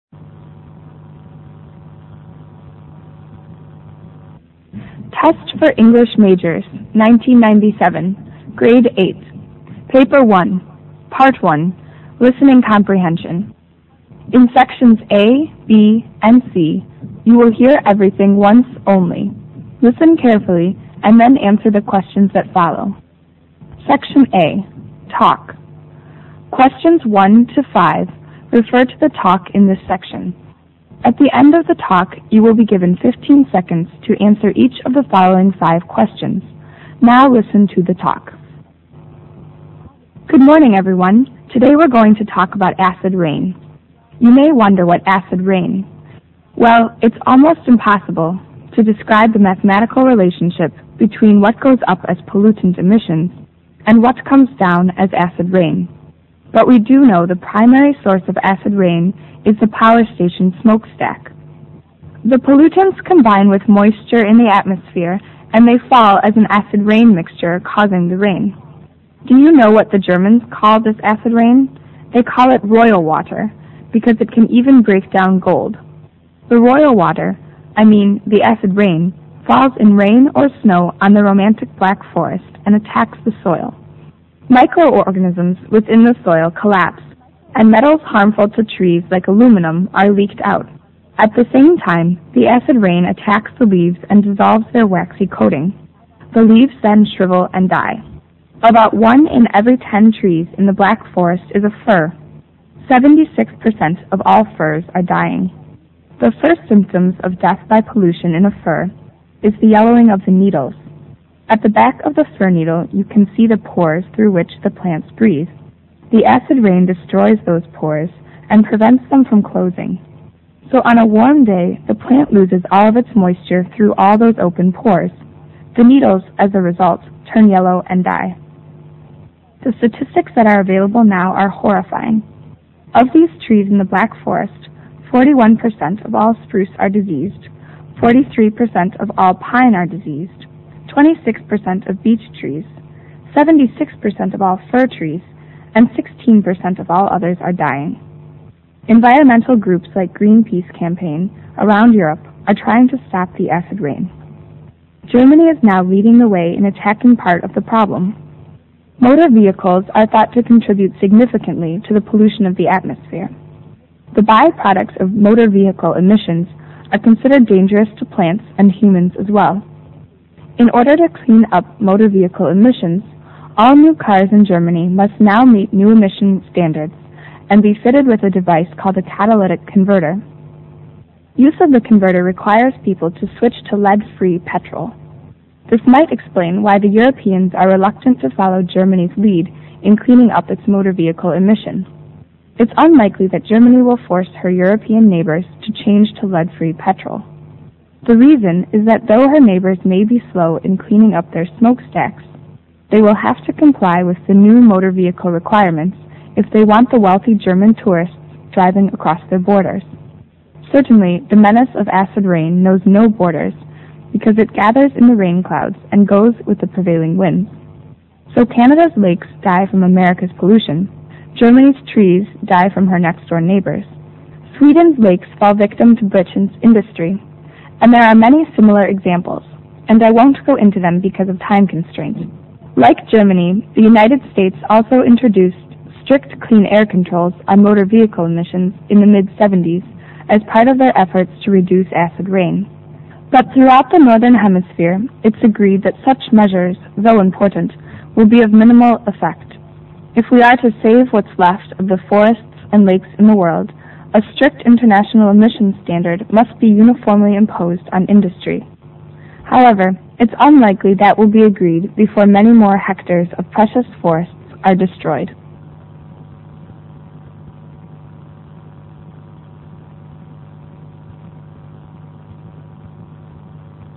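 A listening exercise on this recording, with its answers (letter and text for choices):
In Sections A, B and C you will hear everything ONCE ONLY. Listen carefully and then answer the questions that follow. Mark the correct answer to each question on your Colored Answer Sheet.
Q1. In the Black Forest, the acid rain is said to attack all EXCEPT ___.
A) firs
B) metals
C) leaves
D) soil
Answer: B) metals

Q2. The percentage of firs dying in the Black Forest is ___.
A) 41%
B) 43%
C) 26%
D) 76%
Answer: D) 76%

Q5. On the issue of future solution of acid rain, the speaker's tone is that of ___.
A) warning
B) pessimism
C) indifference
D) optimism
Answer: B) pessimism

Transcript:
SECTION A TALK
Good morning, everyone. Today we're going to talk about acid rain. You may wonder what is acid rain. Well, it is almost impossible to describe the mathematical relationship between what goes up as pollutant emissions and what comes down as acid rain. 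But we do know the primary source of acid rain is the power station smoke stack. The pollutants combine with moisture in the atmosphere and they fall as an acid mixture raising the rain. Do you know what the Germans call this acid rain?
The royal water, I mean the acid rain, falls in rain or snow on the romantic Black Forest ,and attacks the soil. Micro-organisms within the soil collapse and metals harmful to trees like aluminum are leaked out. At the same time, the acid rain attacks the leaves and dissolve their waxy coating. The leaves then shrivel and die. About one in every ten trees in the Black Forest is a fir. 76 percent of all firs are dying. The first symptoms of death by pollution in a fir is the yellowing of the needles. At the back of the fir needle, you can see the pores through which the plant breathes. The acid rain destroys those pores, and prevent them from closing. So on a warm day, the plant loses all of its moisture through those open pores. 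The needles, as a result, turn yellow and die.
The statistics that are available now are horrifying. Of these trees in the Black Forest, 41% of all spruce are diseased, 43% of all pine are diseased, 26% of beech trees, 76% of all fir trees and 16% of all others are dying. Environmental groups like Green Peace campaign around Europe are trying to stop the acid rain.
Germany is now leading the way in attacking part of the problem. Motor vehicles are thought to contribute significantly to the pollution of the atmosphere. The by-products of motor vehicle emissions are considered dangerous to plants, and humans as well.
In order to clean up motor vehicle emissions, all new cars in Germany must meet emission standards and be fitted with a device called "catalytic converter".
Use of the converters requires people to switch to lead-free petrol. This might explain why the Europeans are reluctant to follow Germany's lead in cleaning up its motor vehicle emission. 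It's unlikely that Germany will force her European neighbours to change to lead-free petrol. The reason is that though her neighbours may be slow in cleaning up their smoke stacks, they will have to comply with the new motor vehicle requirements if they want the wealthy German tourists driving across their borders.
Certainly, the menace of acid rain knows no borders because it gathers in the rain clouds and goes with the prevailing winds. So Canada's lakes die from America's pollution. Germany's trees die from her next-door neighbors. Sweden's lakes fall victim to Britain's industry. And there are many similar examples. And I won't go into them because of time constraint.
Like Germany, the United States also introduced strict clean air-controls on motor vehicle emissions in the mid-70s as part of their efforts to reduce acid rain. But throughout the northern hemisphere it's agreed that such measures, though important, will be of minimal effect. 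If we are to save what's left of forests and lakes in the world, a strict international emission standard must be uniformly imposed on industry. However, its unlikely that will be agreed upon before many more acres of precious forests are destroyed.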